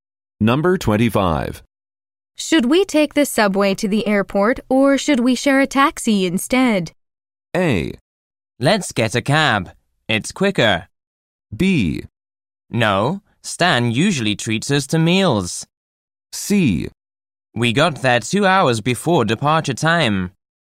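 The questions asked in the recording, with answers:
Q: Should we take the subway to the airport or should we share a taxi instead?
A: A: Let's get a cab. It's quicker.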